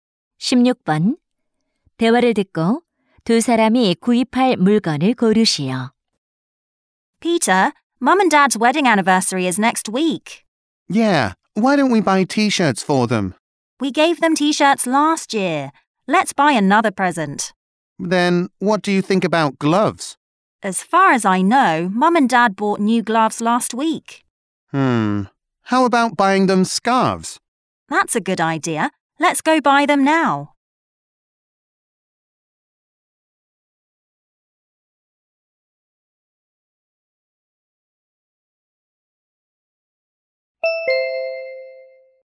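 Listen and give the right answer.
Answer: 스카프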